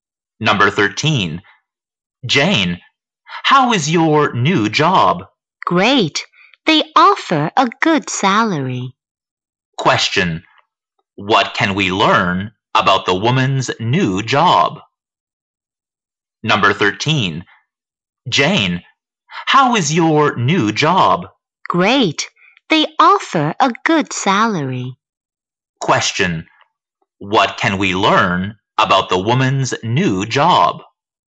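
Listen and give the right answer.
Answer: It offers a good salary.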